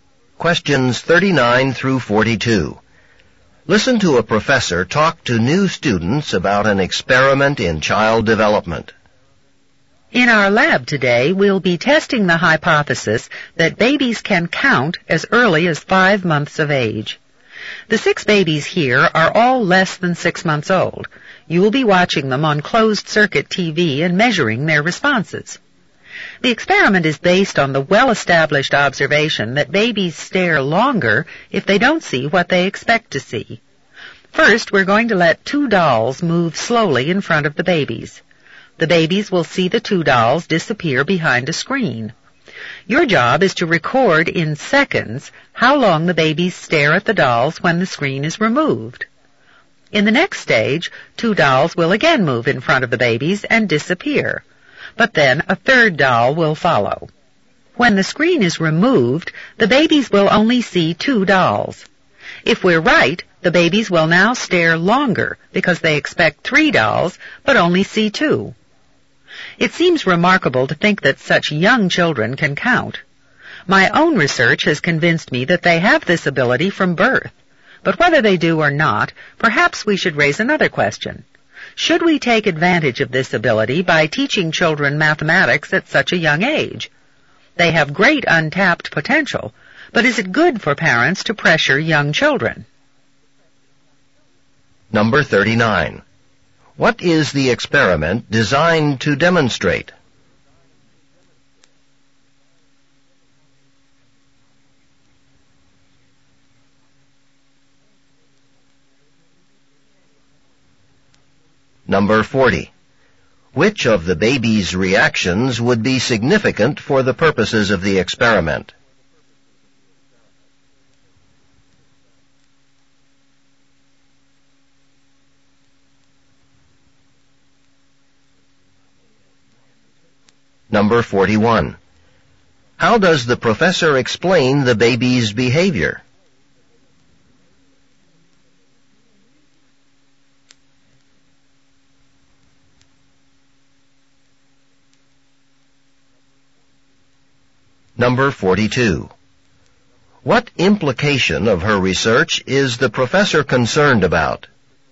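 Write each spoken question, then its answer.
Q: What is the experiment designed to demonstrate?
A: That babies can count as early as 5 months of age

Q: Which of the baby's reactions would be significant for the purposes of the experiment?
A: Staring longer when they see two dolls instead of the expected three

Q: How does the professor explain the baby's behavior?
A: Babies stare longer when they don't see what they expect to see

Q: What implication of her research is the professor concerned about?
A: That parents may pressure very young children by teaching them mathematics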